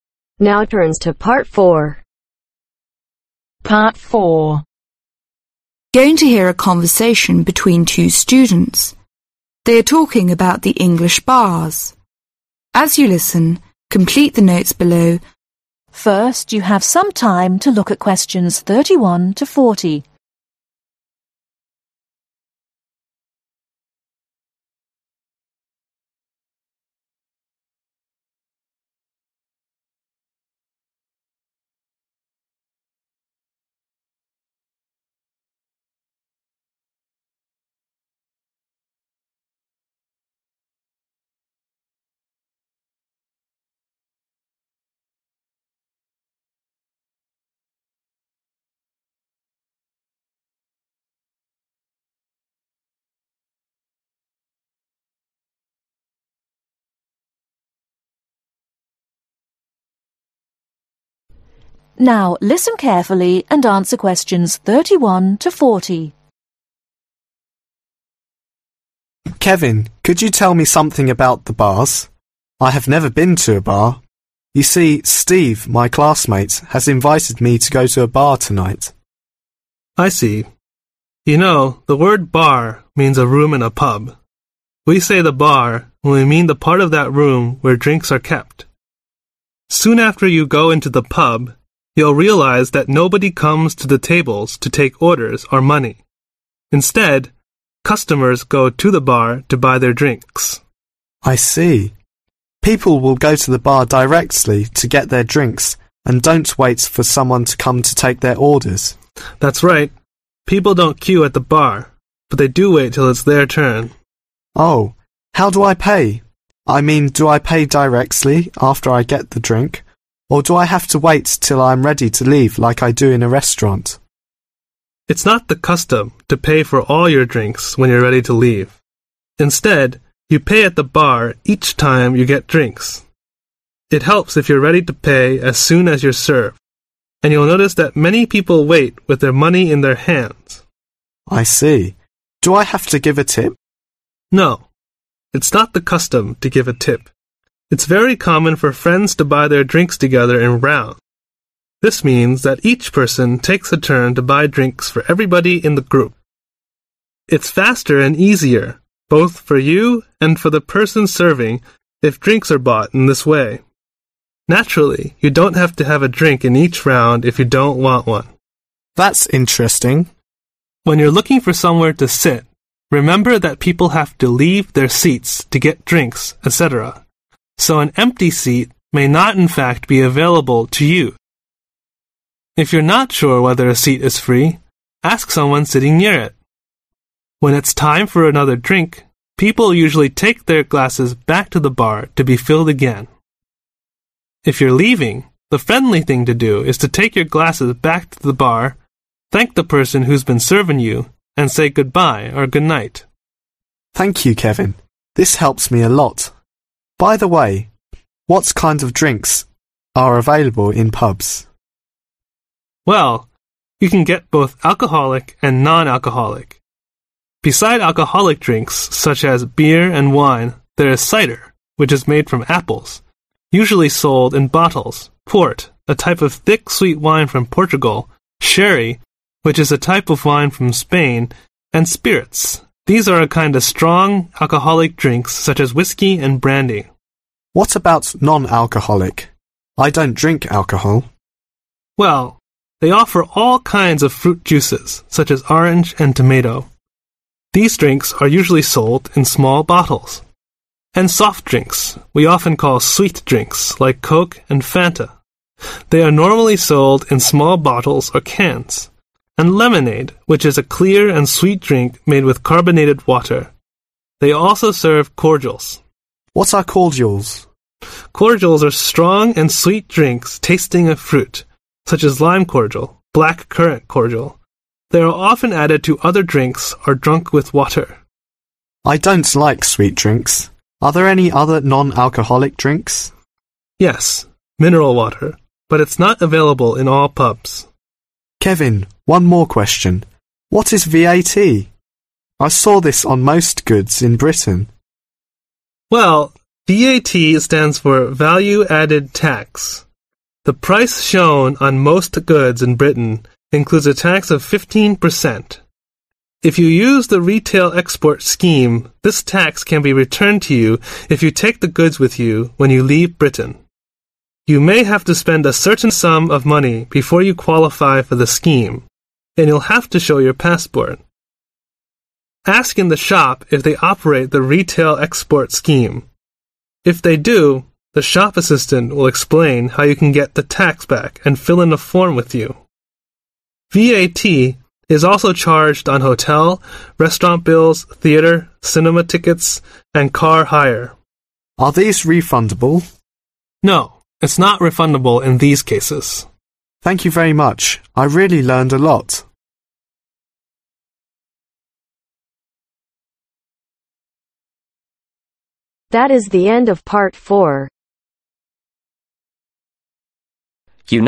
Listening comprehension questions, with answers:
Complete the notes below. Write ONE WORD ONLY for each answer.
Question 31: Bar is the place where (31)............ are kept.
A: Drinks

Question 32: at the bar, people don't wait for someone to take their (32)............ instead,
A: Orders

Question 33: they go to the bar directly to (33)............ their drinks.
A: Buy/Get

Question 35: Cider is made from (35)............ port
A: Apples

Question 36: sherry is a type of wine from (36)............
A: Spain

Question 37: Non-alcoholic drinks include all kinds of fruit juices, such as orange and (37)............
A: Tomato

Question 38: Cordials are strong and sweet drinks tasting of (38)............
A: Fruit

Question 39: VAT stands for (39)............ added Tax.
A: Value

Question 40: VAT can be (40)............ to you if you take the goods with you when you leave Britain.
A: Returned